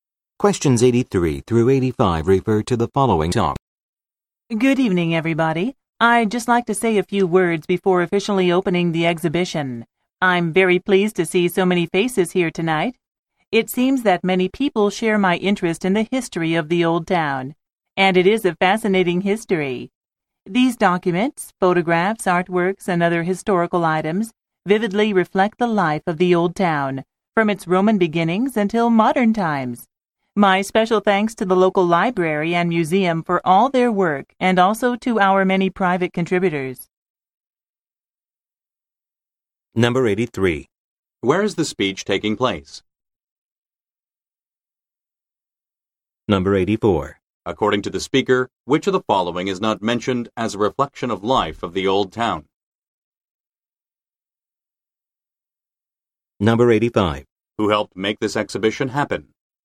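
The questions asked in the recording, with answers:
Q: Where is the speech taking place?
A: At the opening of a history exhibition

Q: Who helped make this exhibition happen?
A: The local library and museum and private contributors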